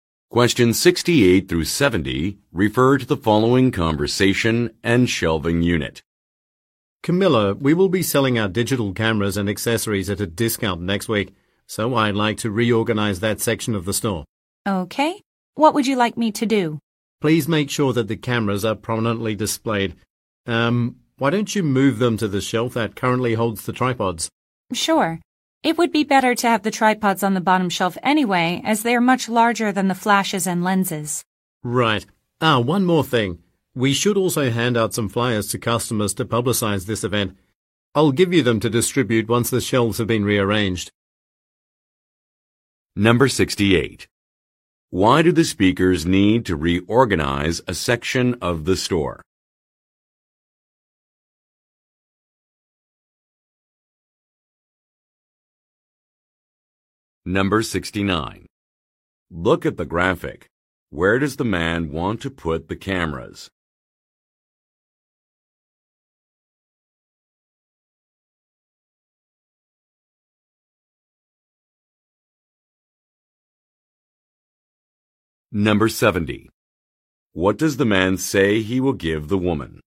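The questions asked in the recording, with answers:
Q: Why do the speakers need to reorganize a section of the store?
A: Digital cameras and accessories will be sold at a discount next week

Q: What does the man say he will give the woman?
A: Flyers to hand out to customers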